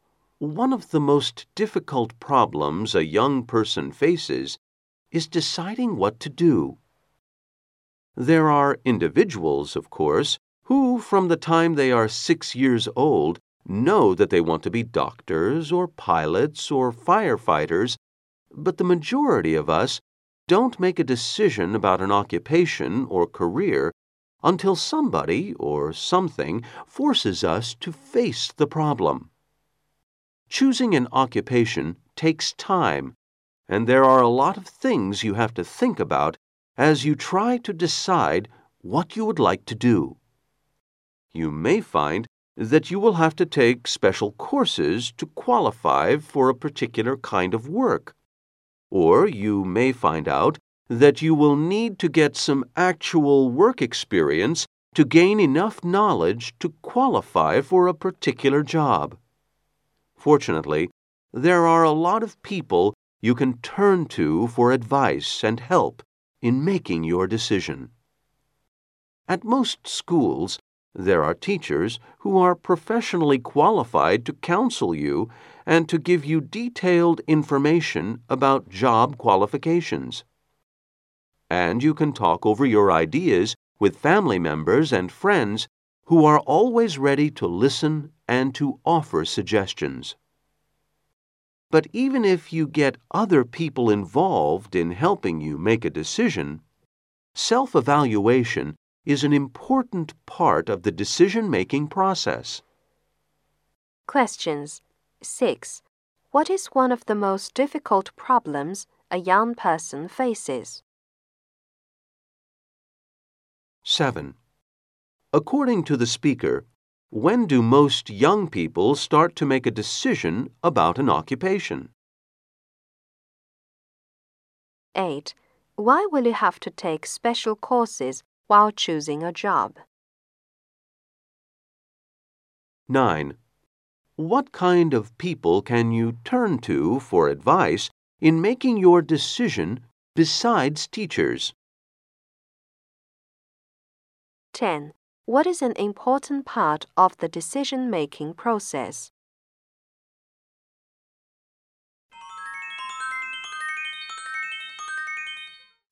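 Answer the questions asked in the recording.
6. Deciding what to do
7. When something forces them
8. To qualify for particular work
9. Family members and friends
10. Self-evaluation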